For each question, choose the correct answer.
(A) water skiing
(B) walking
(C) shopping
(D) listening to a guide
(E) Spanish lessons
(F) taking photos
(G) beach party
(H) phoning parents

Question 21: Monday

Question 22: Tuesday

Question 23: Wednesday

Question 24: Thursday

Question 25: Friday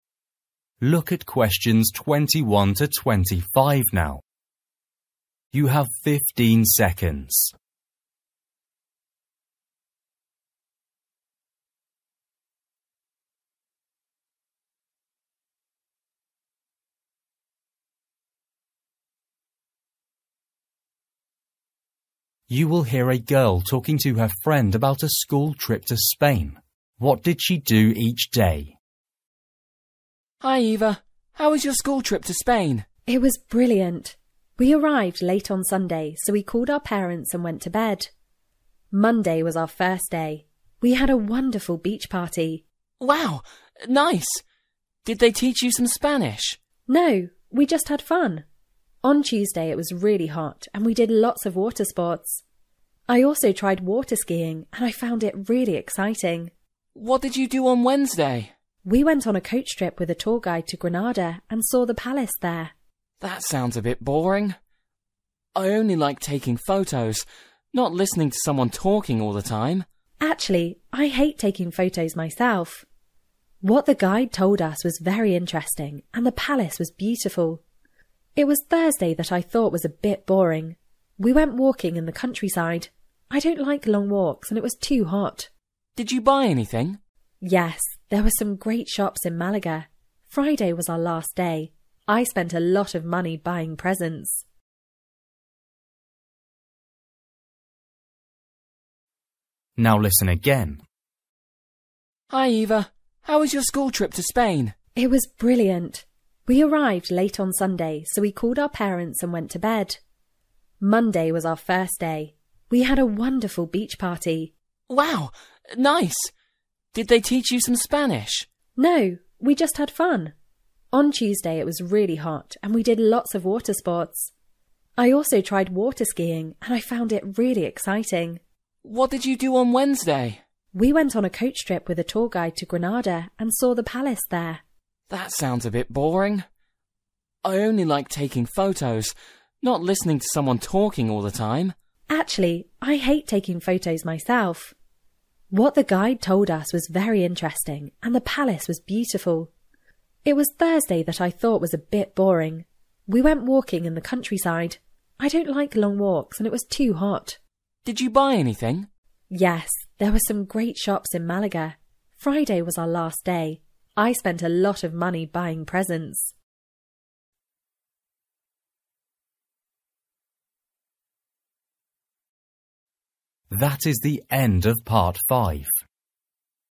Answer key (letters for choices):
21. G
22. A
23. D
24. B
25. C

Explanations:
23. We went on a coach trip with a tour guide to Granada and saw the palace there.

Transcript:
Boy: Hi, Eva. How was your school trip to Spain?
Girl: It was brilliant. We arrived late on Sunday so we called our parents and went to bed. (21) Monday was our first day. We had a wonderful beach party.
Boy: Wow! Nice! Did they teach you some Spanish?
Girl: No, we just had fun. (22) On Tuesday it was really hot and we did lots of water sports. I also tried water skiing and I found it really exciting.
Boy: (23) What did you do on Wednesday?
Girl: (23) We went on a coach trip with a tour guide to Granada and saw the palace there.
Boy: That sounds a bit boring. I only like taking photos; not listening to someone talking all the time.
Girl: Actually, I hate taking photos myself. What the guide told us was very interesting and the palace was beautiful. (24) It was Thursday that I thought was a bit boring. We went walking in the countryside. I don't like long walks and it was too hot.
Boy: Did you buy anything?
Girl: Yes, there were some great shops in Malaga. (25) Friday was our last day. I spent a lot of money buying presents.

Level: KET (A2)